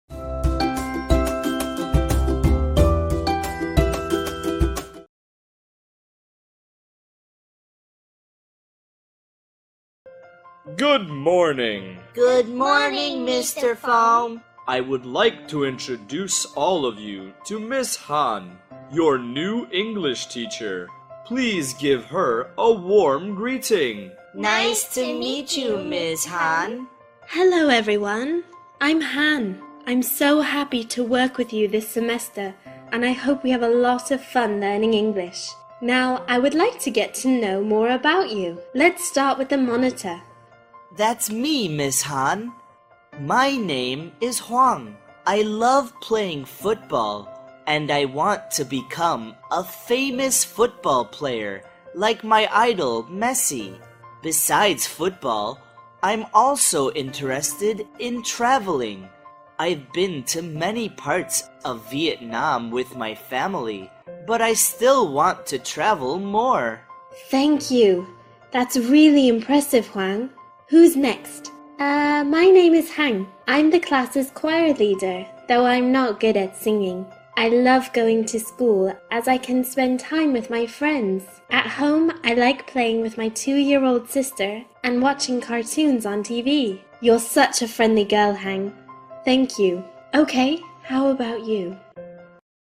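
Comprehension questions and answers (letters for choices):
Task: Choose the correct answer (A, B, or C).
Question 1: What is the name of the new English teacher?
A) Ms. Kim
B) Ms. Hanh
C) Mr. Phong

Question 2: What does Hoang love doing in his free time?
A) Playing football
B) Reading books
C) Traveling abroad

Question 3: What is Hang's favorite activity at home?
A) Singing with friends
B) Playing with her sister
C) Doing homework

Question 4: What does Hoang want to become in the future?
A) Teacher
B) Singer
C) Football player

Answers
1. B
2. A
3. B
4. C

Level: lớp 8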